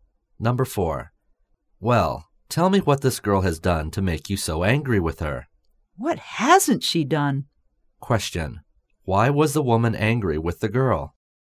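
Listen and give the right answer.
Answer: The girl had done many things wrong.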